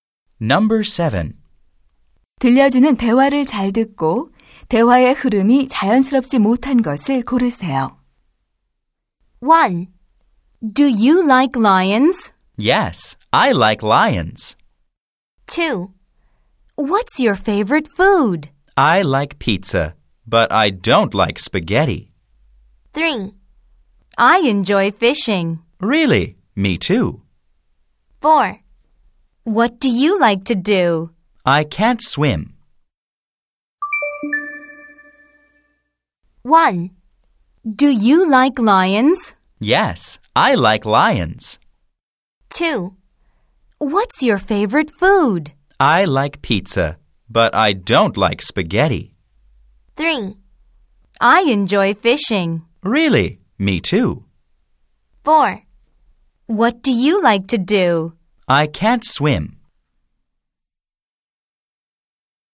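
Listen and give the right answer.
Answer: 4: What do you like to do? / I can't swim.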